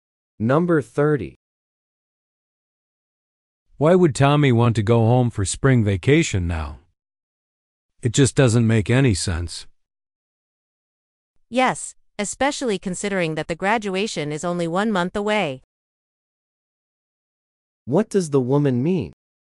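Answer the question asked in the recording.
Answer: Going home now makes no sense because graduation is only a month away.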